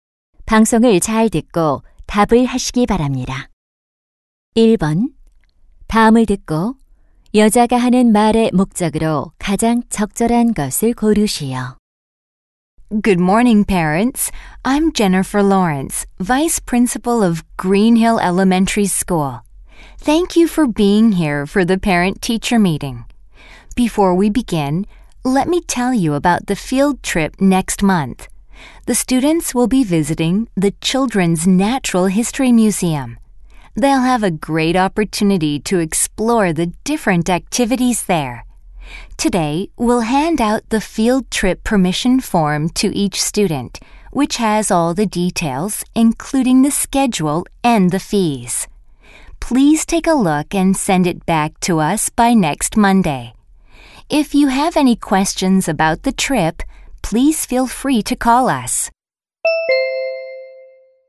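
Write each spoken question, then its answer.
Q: 다음을 듣고 여자가 하는 말의 목적으로 가장 적절한 것을 고르시오.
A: 현장 학습 참가 동의서 제출을 안내하려고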